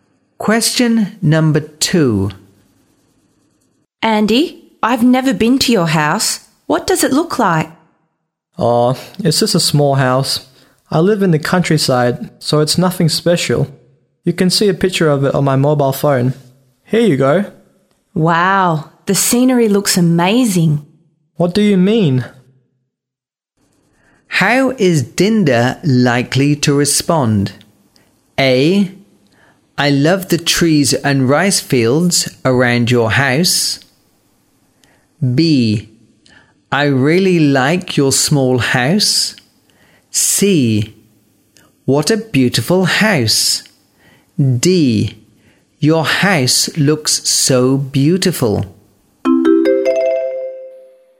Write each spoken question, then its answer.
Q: How is Dinda likely to respond?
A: A. I love the trees and rice fields around your house.